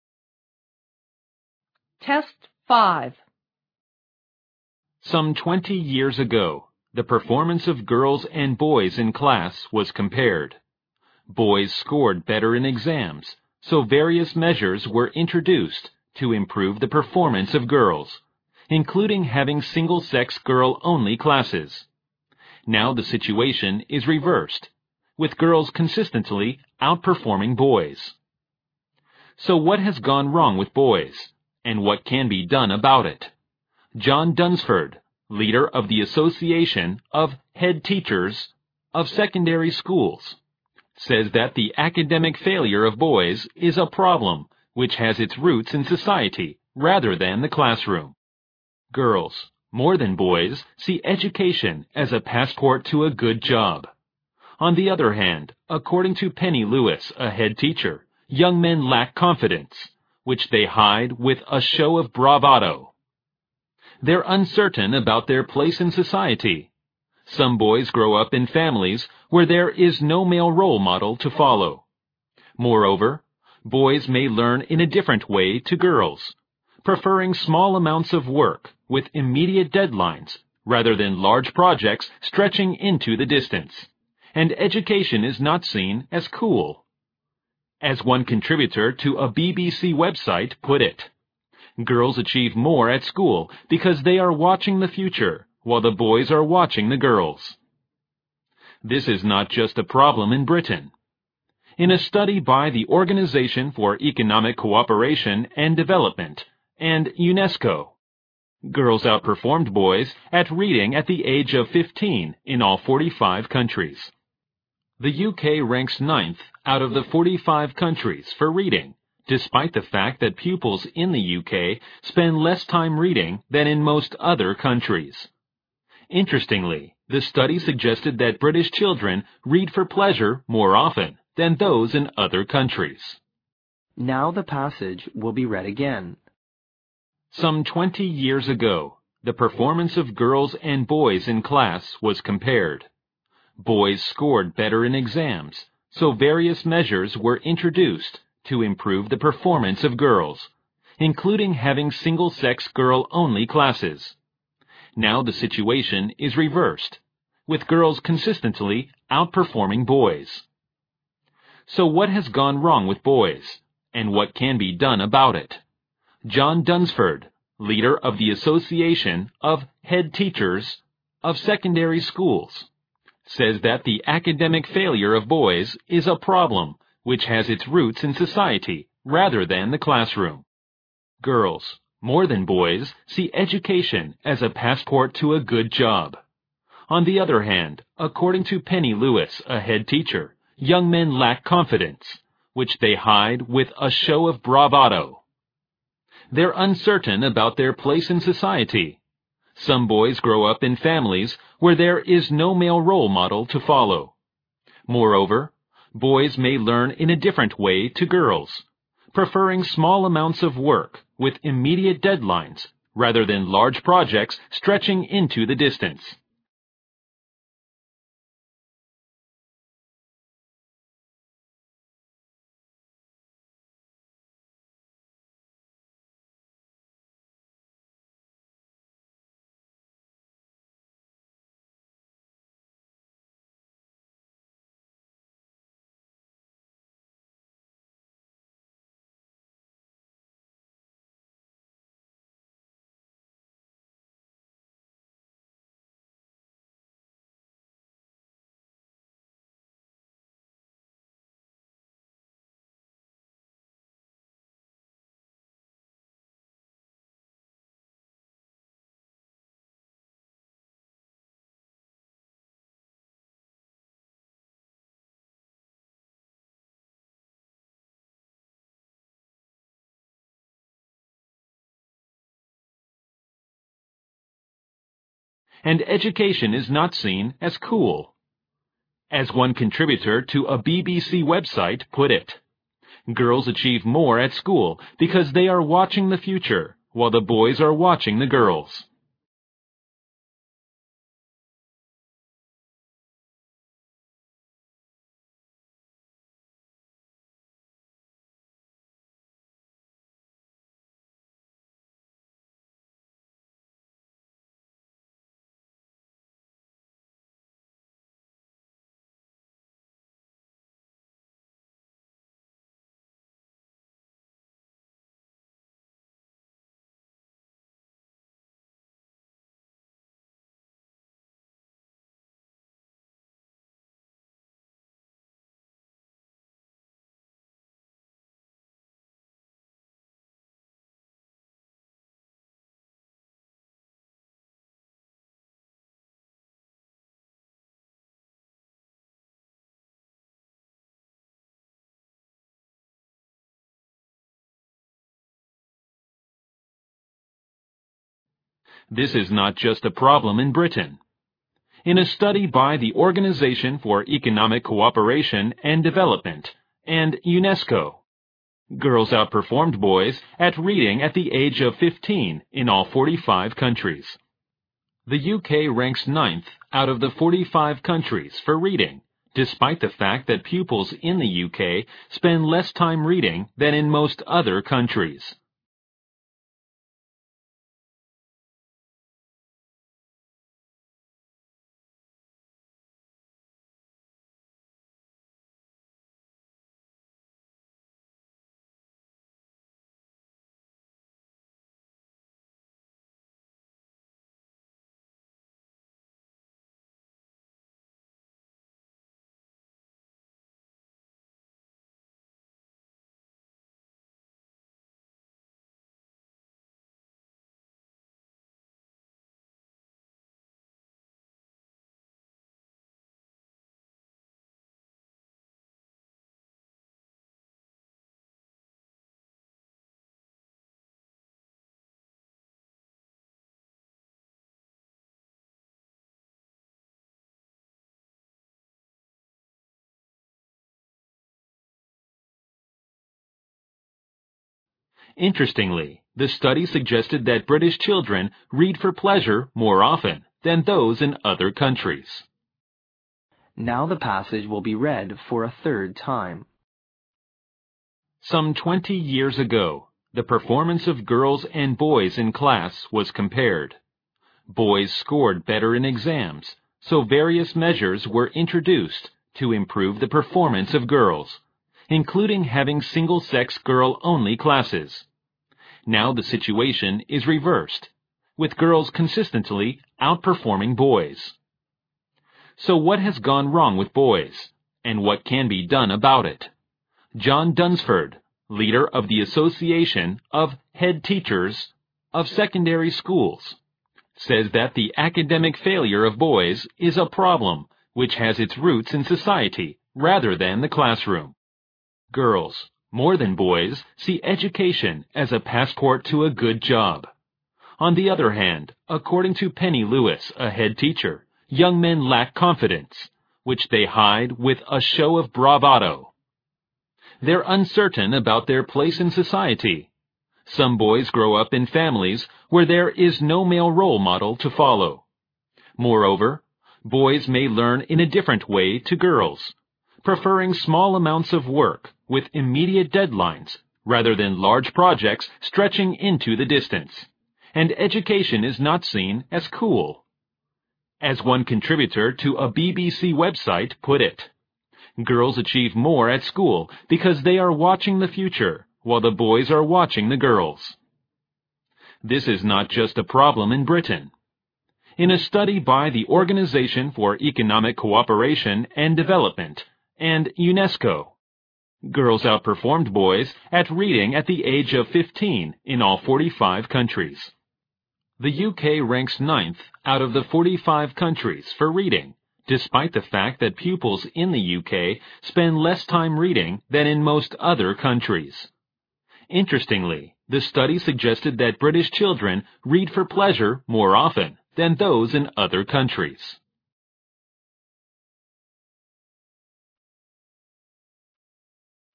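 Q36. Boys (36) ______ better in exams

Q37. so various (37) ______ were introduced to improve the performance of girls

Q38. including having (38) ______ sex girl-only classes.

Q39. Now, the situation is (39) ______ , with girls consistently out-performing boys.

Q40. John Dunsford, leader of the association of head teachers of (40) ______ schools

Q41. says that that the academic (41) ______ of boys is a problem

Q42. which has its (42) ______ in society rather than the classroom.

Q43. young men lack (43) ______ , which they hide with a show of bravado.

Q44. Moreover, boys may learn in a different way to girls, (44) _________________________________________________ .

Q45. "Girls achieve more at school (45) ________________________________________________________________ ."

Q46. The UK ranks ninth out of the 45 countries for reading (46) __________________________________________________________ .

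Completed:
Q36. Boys scored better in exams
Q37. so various measures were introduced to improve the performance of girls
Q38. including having single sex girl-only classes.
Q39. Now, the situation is reversed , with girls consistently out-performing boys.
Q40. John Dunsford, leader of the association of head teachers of secondary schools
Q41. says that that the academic failure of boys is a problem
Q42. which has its roots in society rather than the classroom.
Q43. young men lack confidence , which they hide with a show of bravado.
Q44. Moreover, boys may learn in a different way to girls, preferring small amounts of work with immediate deadlines rather than large projects stretching into the distance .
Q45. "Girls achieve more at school because they are watching the future while the boys are watching the girls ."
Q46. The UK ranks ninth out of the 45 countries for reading despite the fact that pupils in the UK spend less time reading than in most other countries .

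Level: 六级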